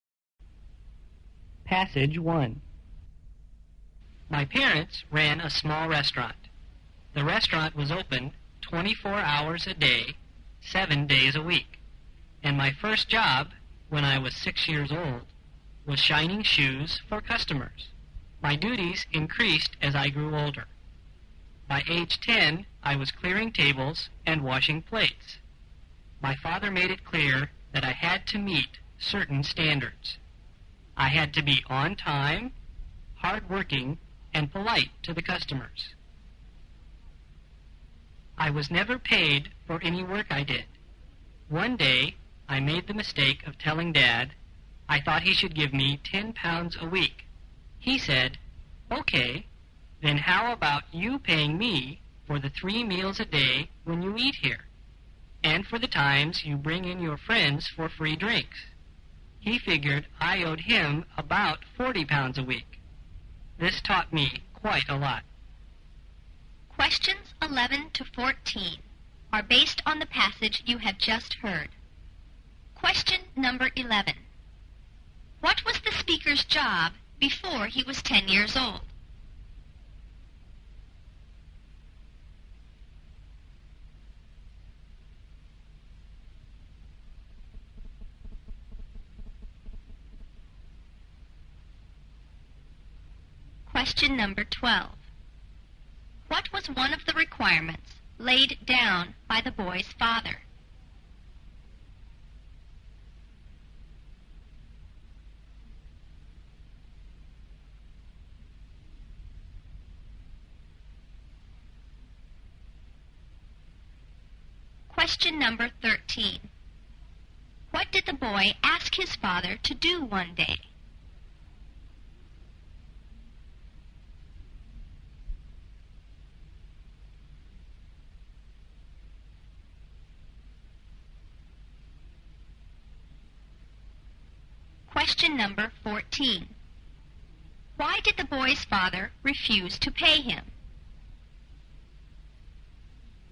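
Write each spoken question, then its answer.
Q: What was the speaker's job before he was 10 years old?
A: Shining shoes for customers

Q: What was one of the requirements laid down by the boy's father?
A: To be on time, hardworking and polite

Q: What did the boy ask his father to do one day?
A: Pay him £10 a week

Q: Why did the boy's father refuse to pay him?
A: The boy owed him more for meals and friends' drinks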